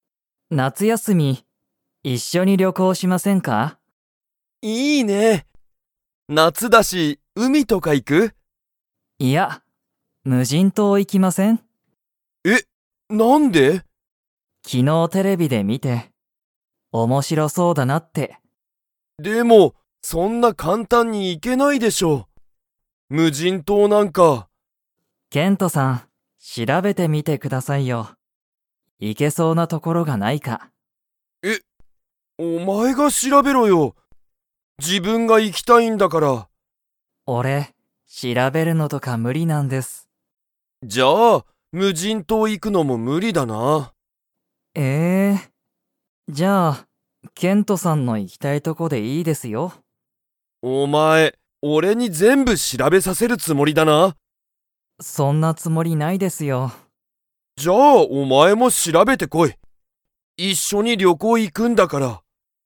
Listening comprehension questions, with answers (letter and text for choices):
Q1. ナオキは、いつ旅行(りょこう)に行(い)きたいですか?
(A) 明日(あした)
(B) 夏休(なつやす)み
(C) 一年後(いちねんご)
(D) 五日後(いつかご)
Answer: (B) 夏休(なつやす)み

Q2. 二人(ふたり)は一緒(いっしょ)に旅行(りょこう)に 。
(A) 行(い)く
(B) 行(い)かない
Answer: (A) 行(い)く

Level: Level 3